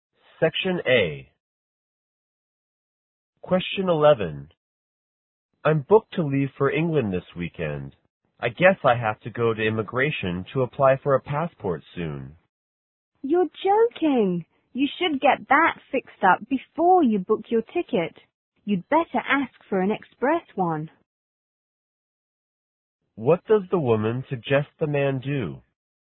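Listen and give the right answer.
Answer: Get his passport, an express one, before booking the ticket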